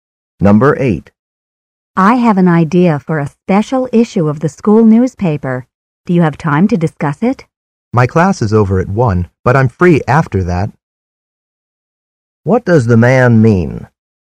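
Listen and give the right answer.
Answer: He can talk about it after 1 o'clock.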